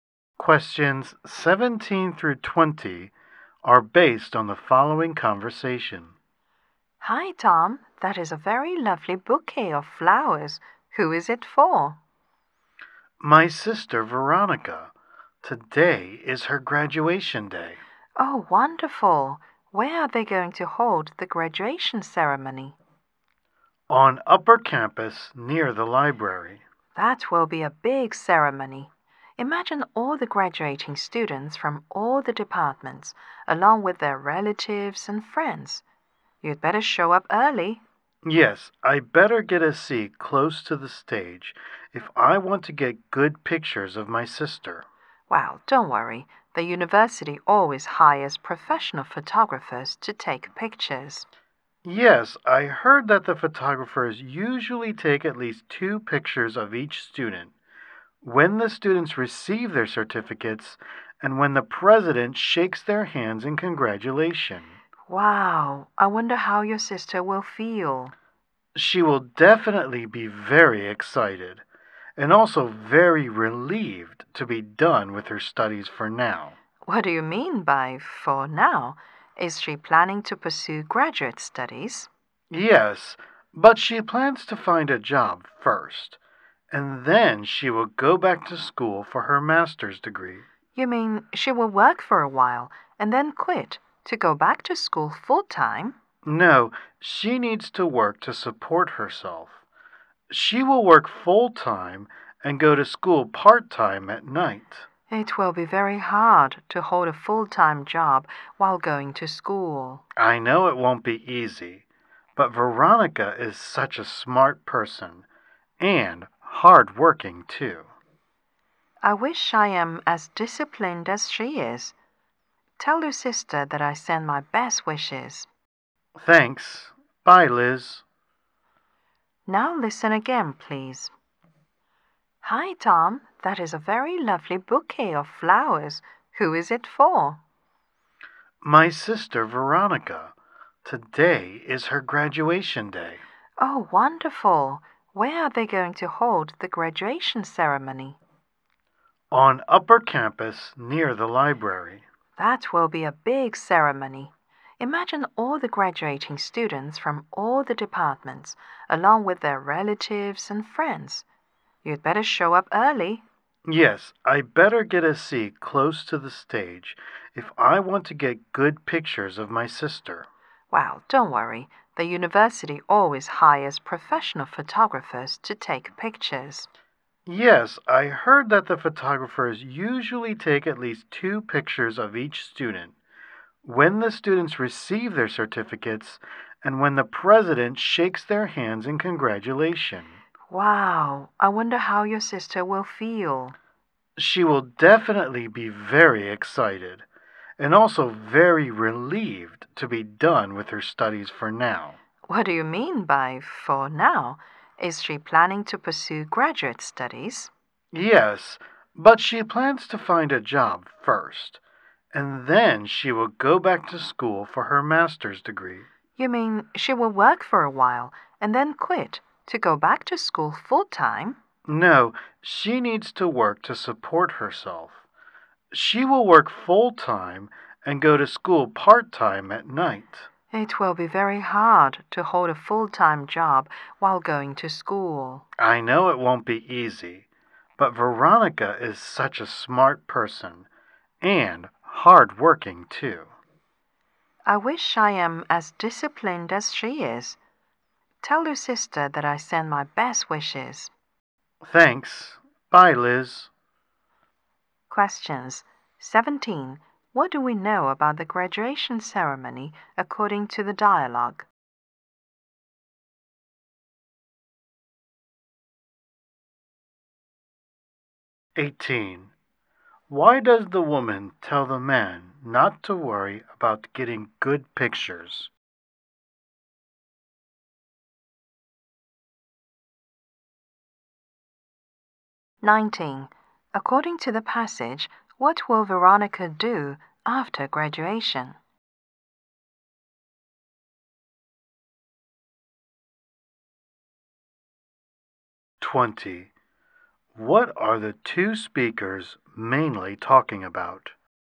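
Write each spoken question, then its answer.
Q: Why does the woman tell the man not to worry about getting good pictures?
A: The university hires professional photographers.

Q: According to the passage, what will Veronica do after graduation?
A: Work full-time and study for a master's part-time at night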